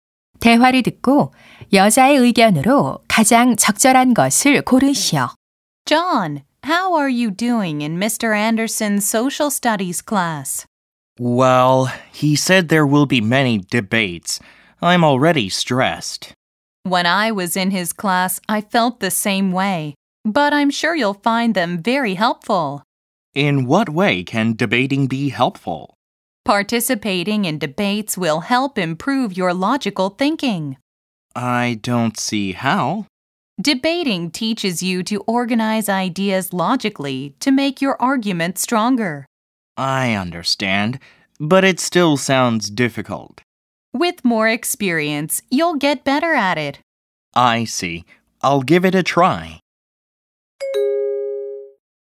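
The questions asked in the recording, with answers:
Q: 대화를 듣고 여자의 의견으로 가장 적절한 것을 고르시오.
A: 토론은 논리적 사고력 향상에 도움이 된다.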